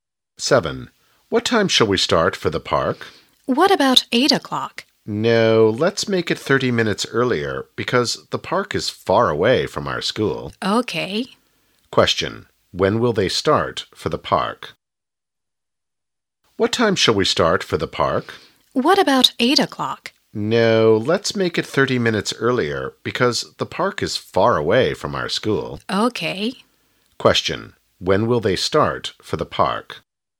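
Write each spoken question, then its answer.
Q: When will they start for the park?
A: At 7:30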